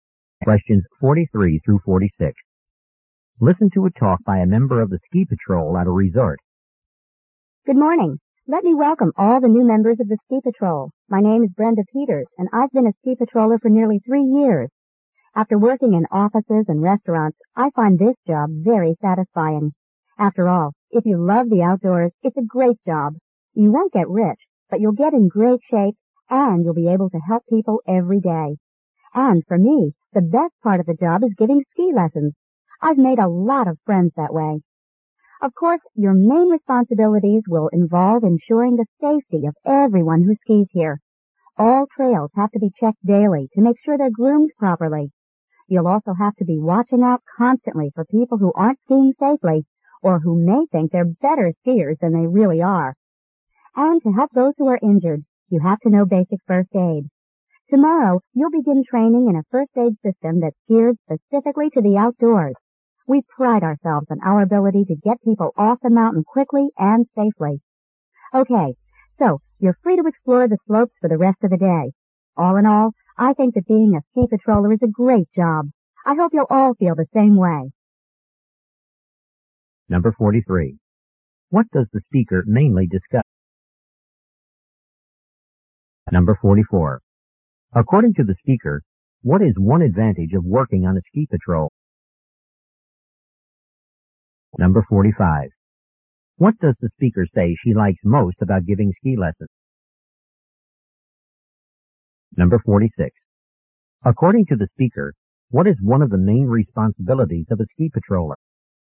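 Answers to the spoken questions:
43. The job of a ski patroller.
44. You get in great shape and help people.
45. She has made a lot of friends.
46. Ensuring skiers' safety, such as checking trails daily.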